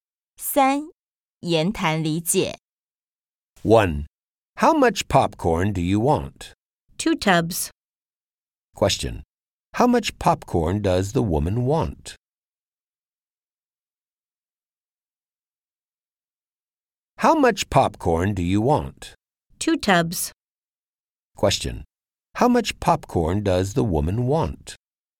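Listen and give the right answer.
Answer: Two tubs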